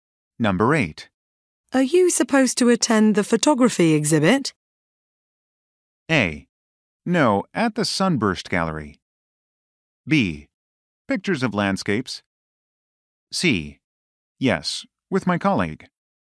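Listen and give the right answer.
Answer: C: Yes, with my colleague.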